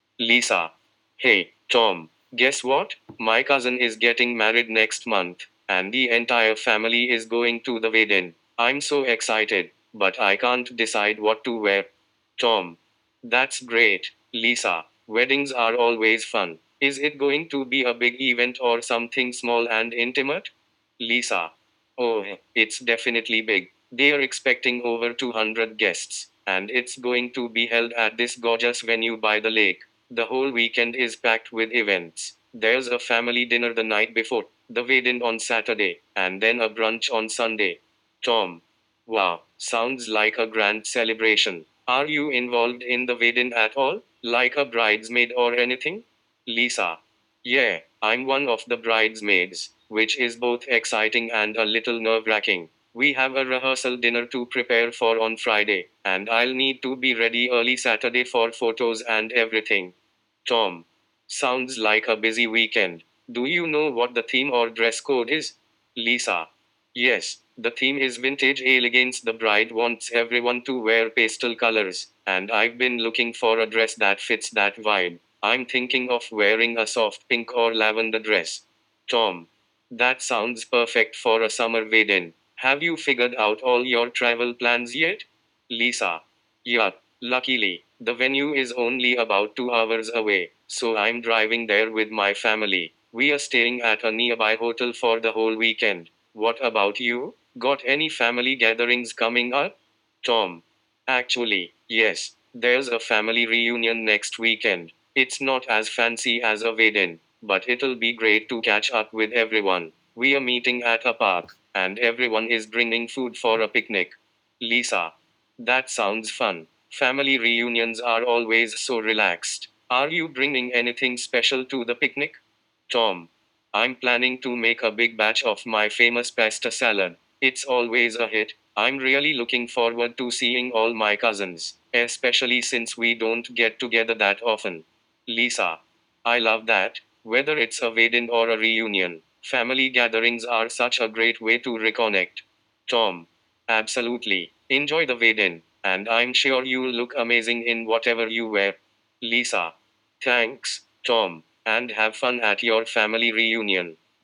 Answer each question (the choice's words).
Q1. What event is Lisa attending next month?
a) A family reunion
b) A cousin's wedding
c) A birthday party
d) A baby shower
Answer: A cousin's wedding

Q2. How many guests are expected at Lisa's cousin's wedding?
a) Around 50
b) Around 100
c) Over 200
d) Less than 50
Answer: Over 200

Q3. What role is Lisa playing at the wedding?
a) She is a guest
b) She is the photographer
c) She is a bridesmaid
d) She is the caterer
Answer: She is a bridesmaid

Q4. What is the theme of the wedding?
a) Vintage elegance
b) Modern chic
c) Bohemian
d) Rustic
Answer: Vintage elegance

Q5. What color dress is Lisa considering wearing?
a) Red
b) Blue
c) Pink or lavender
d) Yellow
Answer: Pink or lavender

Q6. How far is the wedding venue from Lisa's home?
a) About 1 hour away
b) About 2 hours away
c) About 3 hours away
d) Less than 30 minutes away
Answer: About 2 hours away

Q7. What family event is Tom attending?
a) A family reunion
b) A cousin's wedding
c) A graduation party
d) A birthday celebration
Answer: A family reunion

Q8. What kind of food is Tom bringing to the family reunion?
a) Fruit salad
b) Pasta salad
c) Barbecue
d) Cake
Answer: Pasta salad

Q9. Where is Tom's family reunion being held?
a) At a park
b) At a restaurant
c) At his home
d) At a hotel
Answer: At a park

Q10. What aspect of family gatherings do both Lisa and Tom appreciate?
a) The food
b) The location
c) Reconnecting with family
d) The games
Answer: Reconnecting with family

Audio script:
[Person A: Lisa]
Hey, Tom! Guess what? My cousin is getting married next month, and the entire family is going to the wedding. I'm so excited, but I can't decide what to wear!
[Person B: Tom]
That's great, Lisa! Weddings are always fun. Is it going to be a big event or something small and intimate?
[Lisa]
Oh, it's definitely big! They're expecting over 200 guests, and it's going to be held at this gorgeous venue by the lake. The whole weekend is packed with events—there's a family dinner the night before, the wedding on Saturday, and then a brunch on Sunday.
[Tom]
Wow, sounds like a grand celebration! Are you involved in the wedding at all? Like a bridesmaid or anything?
[Lisa]
Yeah, I'm one of the bridesmaids, which is both exciting and a little nerve-wracking! We have a rehearsal dinner to prepare for on Friday, and I'll need to be ready early Saturday for photos and everything.
[Tom]
Sounds like a busy weekend. Do you know what the theme or dress code is?
[Lisa]
Yes, the theme is "vintage elegance." The bride wants everyone to wear pastel colors, and I've been looking for a dress that fits that vibe. I'm thinking of wearing a soft pink or lavender dress.
[Tom]
That sounds perfect for a summer wedding! Have you figured out all your travel plans yet?
[Lisa]
Luckily, the venue is only about two hours away, so I'm driving there with my family. We're staying at a nearby hotel for the whole weekend. What about you? Got any family gatherings coming up?
[Tom]
Actually, yes! There's a family reunion next weekend. It's not as fancy as a wedding, but it'll be great to catch up with everyone. We're meeting at a park, and everyone is bringing food for a picnic.
[Lisa]
That sounds fun! Family reunions are always so relaxed. Are you bringing anything special to the picnic?
[Tom]
I'm planning to make a big batch of my famous pasta salad. It's always a hit! I'm really looking forward to seeing all my cousins, especially since we don't get together that often.
[Lisa]
I love that! Whether it's a wedding or a reunion, family gatherings are such a great way to reconnect.
[Tom]
Absolutely! Enjoy the wedding, and I'm sure you'll look amazing in whatever you wear.
[Lisa]
Thanks, Tom! And have fun at your family reunion!